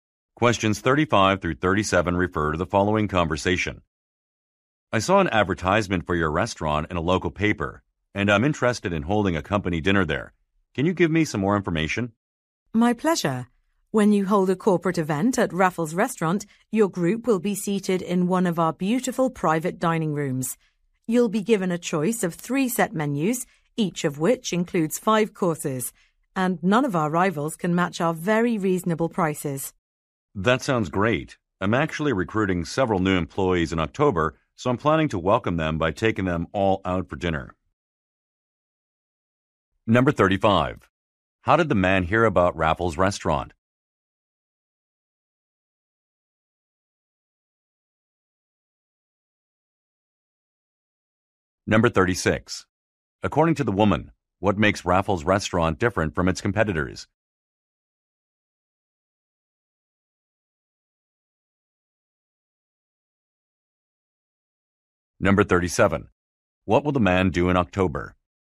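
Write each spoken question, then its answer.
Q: How did the man hear about Raffles Restaurant?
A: From an advertisement in a local paper

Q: According to the woman, what makes Raffles Restaurant different from its competitors?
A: Its very reasonable prices

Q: What will the man do in October?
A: Recruit several new employees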